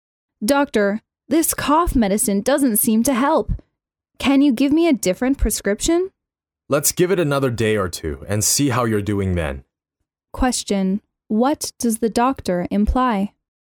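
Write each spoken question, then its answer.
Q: what does the doctor imply?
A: The patient should keep taking the same medicine for another day or two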